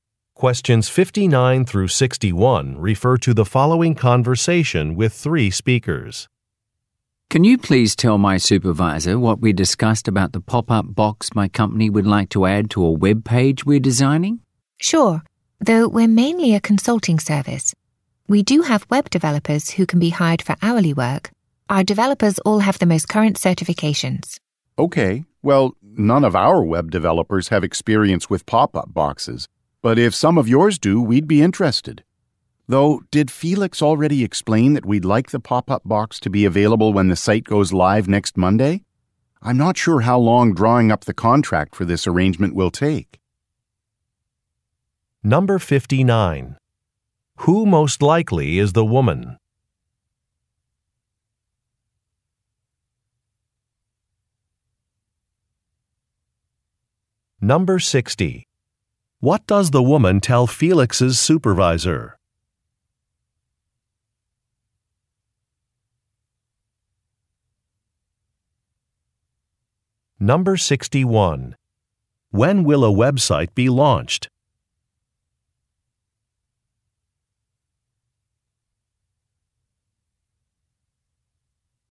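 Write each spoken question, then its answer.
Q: When will a website be launched?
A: Next Monday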